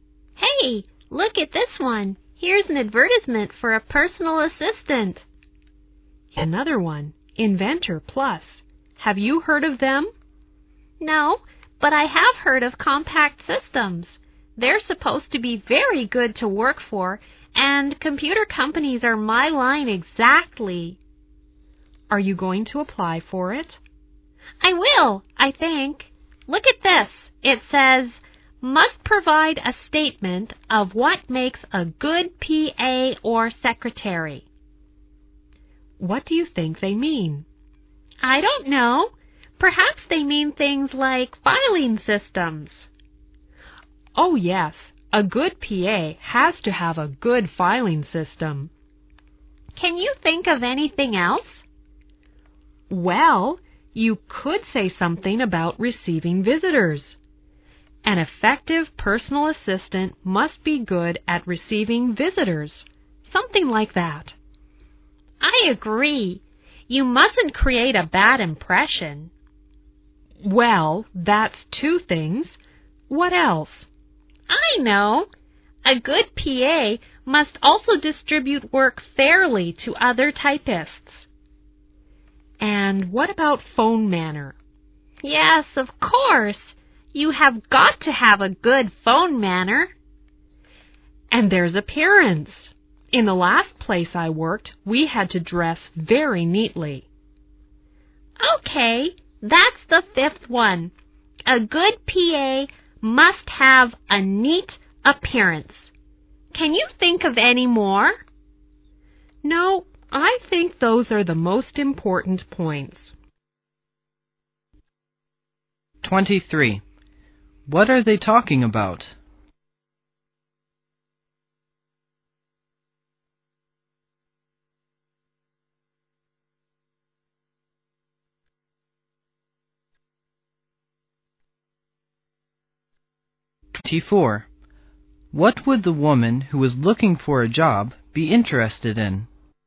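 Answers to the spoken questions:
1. A job ad for a personal assistant and what makes a good PA
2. A job with a computer company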